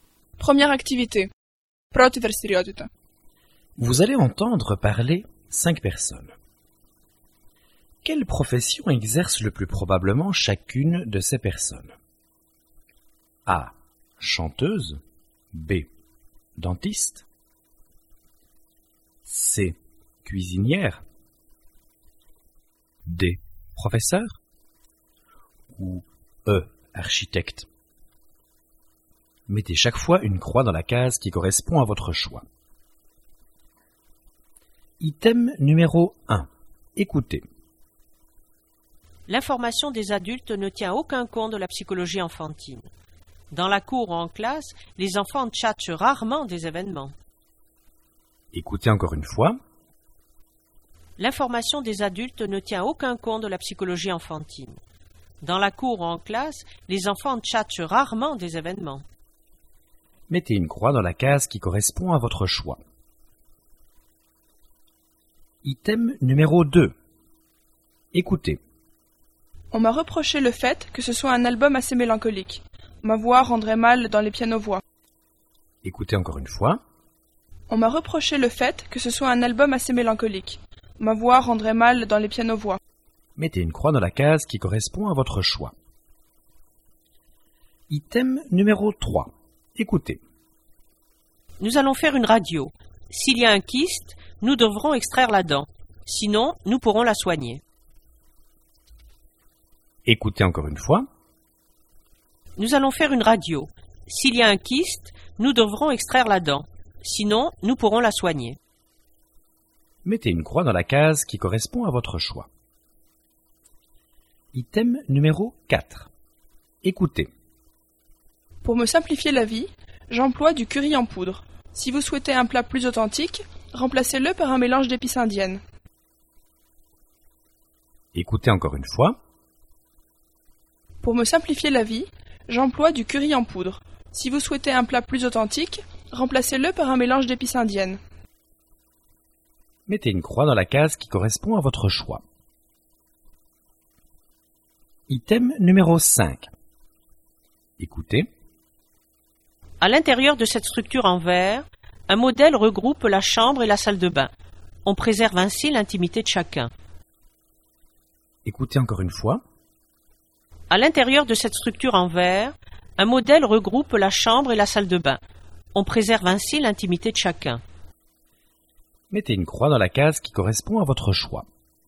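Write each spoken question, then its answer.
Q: Quelle profession exerce le plus probablement chacune de ces personnes?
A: D: Professeur

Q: Quelle profession exerce le plus probablement chacune de ces personnes?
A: A: Chanteuse

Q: Quelle profession exerce le plus probablement chacune de ces personnes?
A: B: Dentiste

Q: Quelle profession exerce le plus probablement chacune de ces personnes?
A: C: Cuisinière

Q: Quelle profession exerce le plus probablement chacune de ces personnes?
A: E: Architecte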